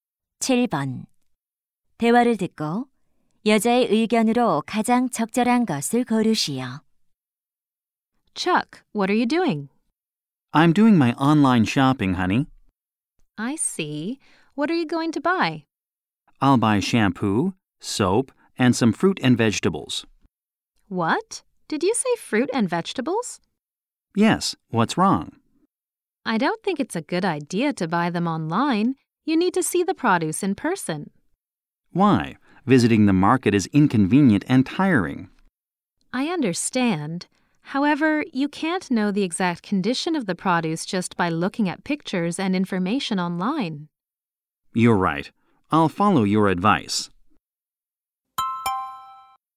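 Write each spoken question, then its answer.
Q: 대화를 듣고 여자의 의견으로 가장 적절한 것을 고르시오.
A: 과일과 채소는 직접 보고 사야 한다.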